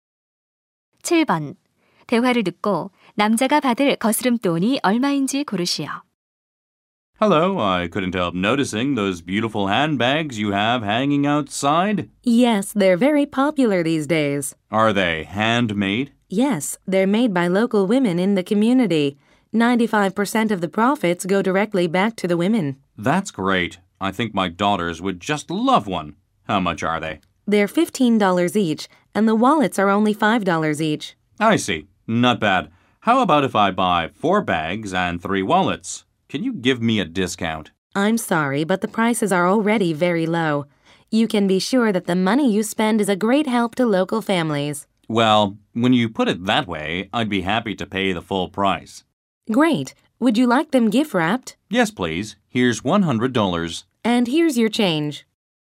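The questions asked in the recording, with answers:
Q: 대화를 듣고 남자가 받을 거스름돈이 얼마인지 고르시오.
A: 25달러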